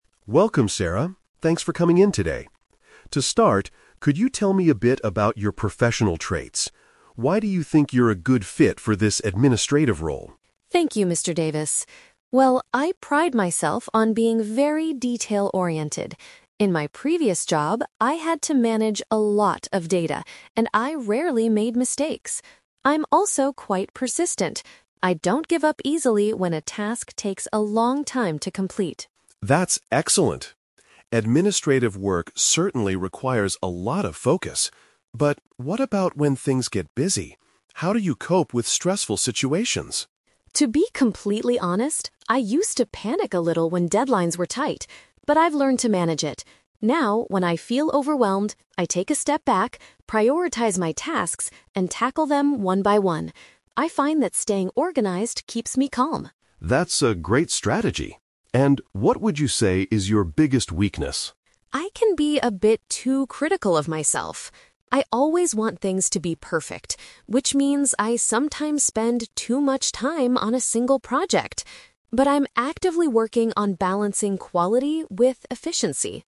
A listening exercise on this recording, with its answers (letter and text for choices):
Listen to a job interview between a manager, Mr. Davis, and a candidate, Sarah. For each question, choose the correct answer A, B, or C.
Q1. What is one of Sarah's main strengths?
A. She works extremely well in a team.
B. She pays close attention to small details.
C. She finishes tasks much faster than others.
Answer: B. She pays close attention to small details.

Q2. How does Sarah CURRENTLY deal with high-pressure situations?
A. She panics and misses her deadlines.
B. She asks her manager for help with tasks.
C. She decides which jobs are most important first.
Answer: C. She decides which jobs are most important first.

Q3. What does Sarah consider to be her negative trait?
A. She expects too much of herself.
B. She produces low-quality work when rushed.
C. She easily gives up on difficult projects.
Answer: A. She expects too much of herself.

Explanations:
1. Sarah describes herself as "detail-oriented" and mentions she "rarely made mistakes" when managing data. Option B is a perfect paraphrase of being detail-oriented. Trap Alert: Option C is a trap. She actually says she "sometimes spends too much time on a single project" to make it perfect, which means she might work slower, not faster. Option A is a common interview strength but is not mentioned in the audio.
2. When Sarah feels overwhelmed, she says she will "prioritize my tasks." To prioritize means to decide which jobs are the most important to do first. Trap Alert: Option A is a trap. Sarah says she "used to panic" in the past, but the question asks how she currently (now) deals with pressure. Option B is plausible but not mentioned.
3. Sarah admits that she is "too critical of myself" and "always want things to be perfect." This means she has very high expectations for herself. Trap Alert: Option B is a trap because she mentions the words "balancing quality," but she never says her work is low-quality. Option C is the exact opposite of what she said earlier (she is "persistent" and doesn't give up easily).

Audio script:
Mr. Davis: Welcome, Sarah. Thanks for coming in today. To start, could you tell me a bit about your professional traits? Why do you think you're a good fit for this administrative role?
Sarah: Thank you, Mr. Davis. Well, I pride myself on being very detail-oriented. In my previous job, I had to manage a lot of data, and I rarely made mistakes. I'm also quite persistent. I don't give up easily when a task takes a long time to complete.
Mr. Davis: That's excellent. Administrative work certainly requires a lot of focus. But what about when things get busy? How do you cope with stressful situations?
Sarah: To be completely honest, I used to panic a little when deadlines were tight. But I've learned to manage it. Now, when I feel overwhelmed, I take a step back, prioritize my tasks, and tackle them one by one. I find that staying organized keeps me calm.
Mr. Davis: That's a great strategy. And what would you say is your biggest weakness?
Sarah: I can be a bit too critical of myself. I always want things to be perfect, which means I sometimes spend too much time on a single project. But I'm actively working on balancing quality with efficiency.